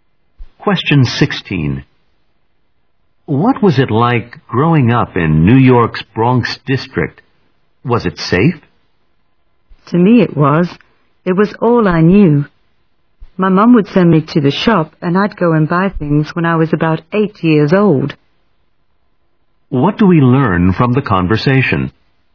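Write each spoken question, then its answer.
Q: What do we learn from the conversation?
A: The speaker felt safe growing up in the Bronx.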